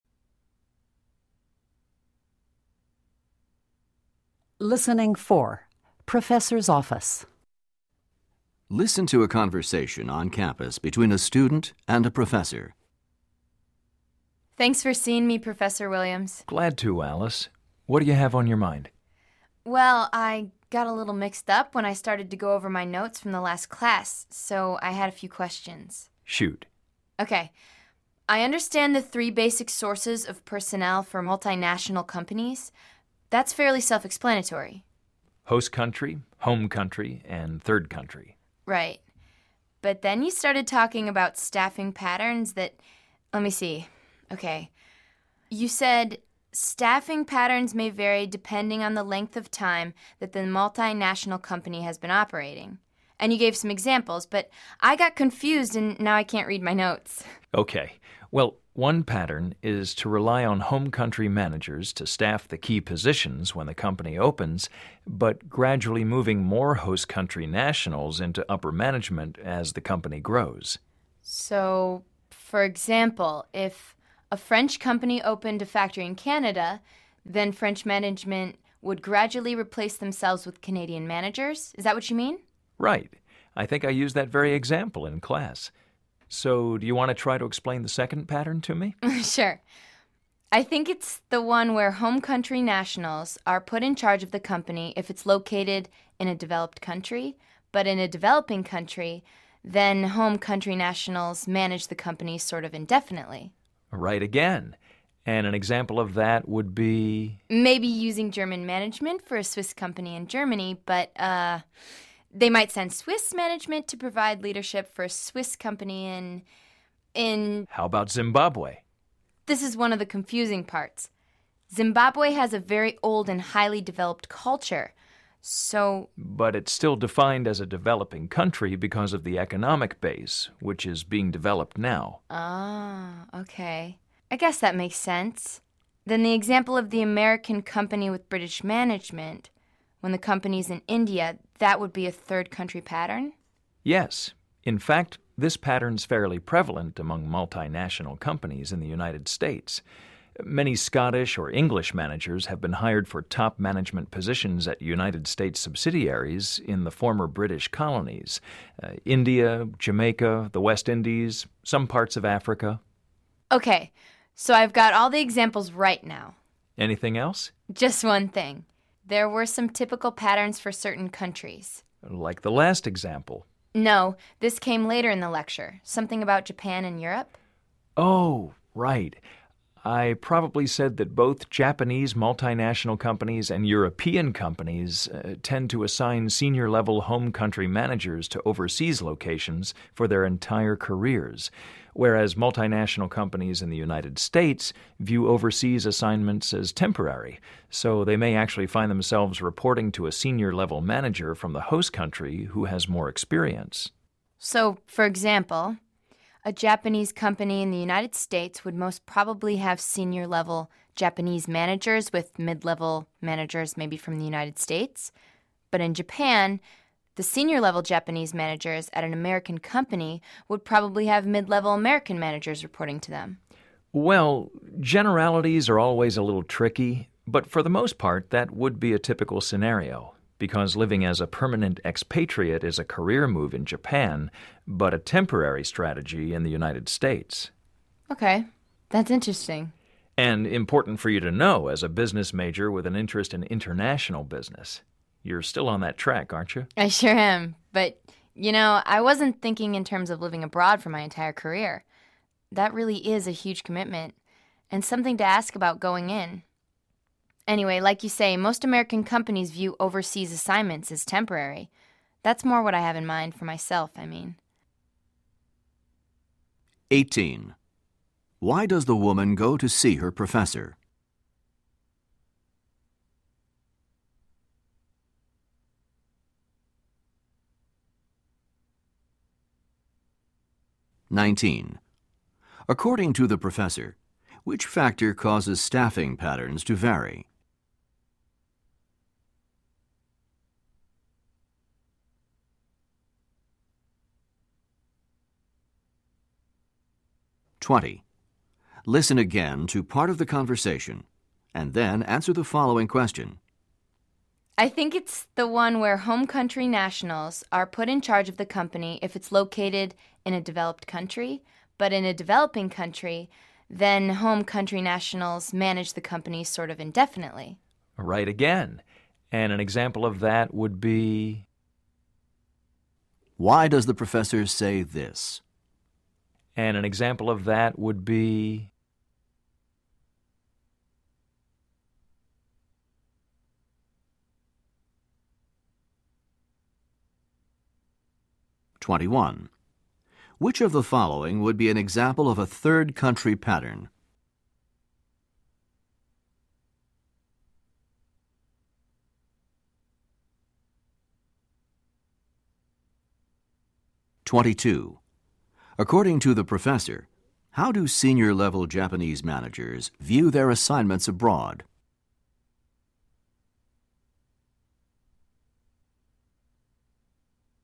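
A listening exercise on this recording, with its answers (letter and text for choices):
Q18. Why does the woman go to see her professor?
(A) To get notes from a class that she has missed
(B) To clarify some of the information from a lecture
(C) To talk about her career in international business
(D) To ask some questions about a paper she is writing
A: (B) To clarify some of the information from a lecture

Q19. According to the professor, which factor causes staffing patterns to vary?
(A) The yearly earnings for all of the branch offices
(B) The number of employees in a multinational company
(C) The place where a company has its home office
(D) The number of years that a company has been in business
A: (D) The number of years that a company has been in business

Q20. Why does the professor say this:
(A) To indicate that he is getting impatient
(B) To encourage the woman to continue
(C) To show that he does not understand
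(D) To correct the woman's previous comment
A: (B) To encourage the woman to continue

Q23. According to the professor, how do senior-level Japanese managers view their assignments abroad?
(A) They consider them to be permanent career opportunities.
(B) They use them to learn skills that they will use in Japan.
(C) They understand that the assignment is only temporary.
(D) They see them as a strategy for their retirement.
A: (A) They consider them to be permanent career opportunities.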